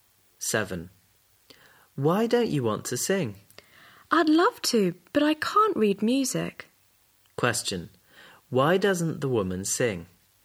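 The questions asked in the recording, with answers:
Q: Why doesn't the woman sing?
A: She can't read music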